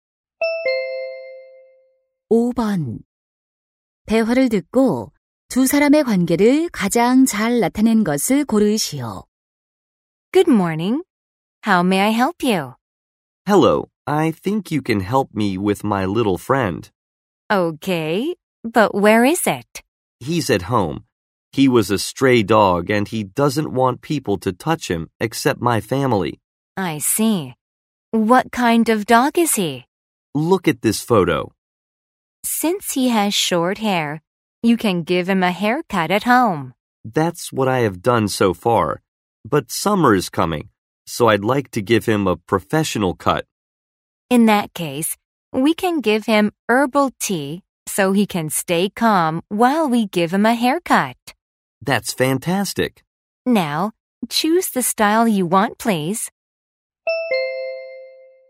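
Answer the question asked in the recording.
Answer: 애견 미용사 - 손님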